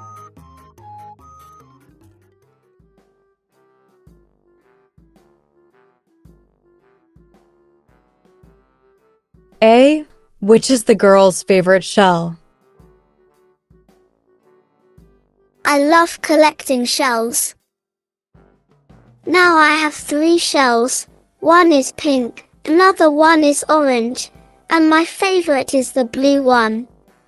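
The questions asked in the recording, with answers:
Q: Which is the girl's favorite shell?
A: the blue one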